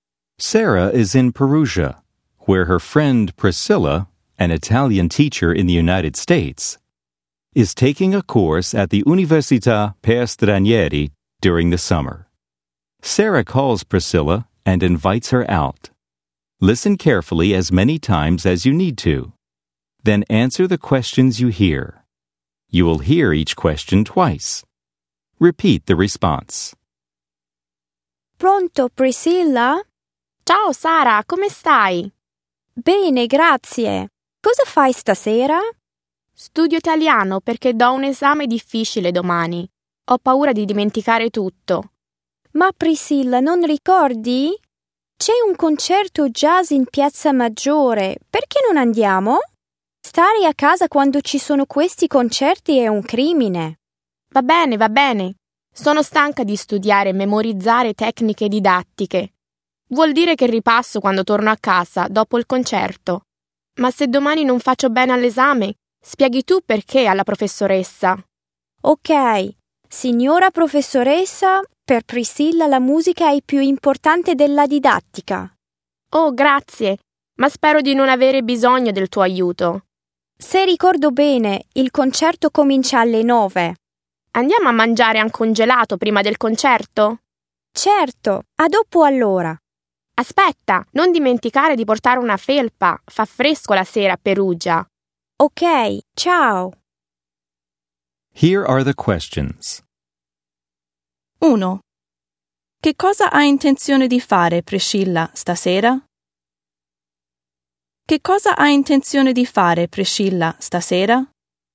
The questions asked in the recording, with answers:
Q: Che cosa hai intenzione di fare, Priscilla, stasera?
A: Ha intenzione di studiare per l'esame.